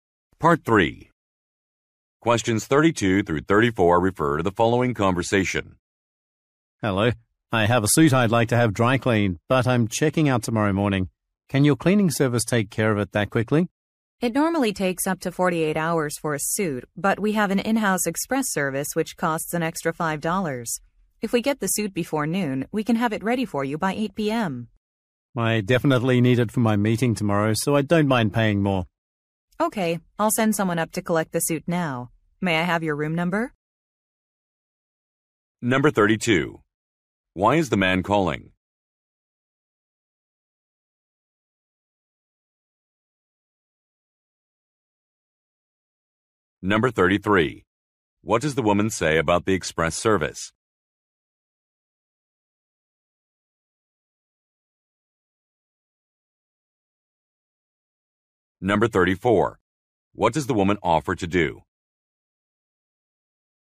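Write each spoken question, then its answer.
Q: Why is the man calling?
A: To ask if his suit can be dry cleaned quickly before he checks out

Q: What does the woman say about the express service?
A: It costs an extra $5

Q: What does the woman offer to do?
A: Send someone up to collect the suit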